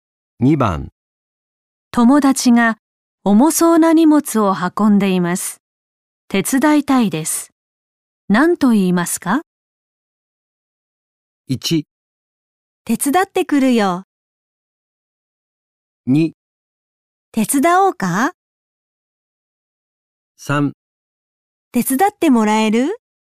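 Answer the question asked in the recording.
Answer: 2: 手伝おうか?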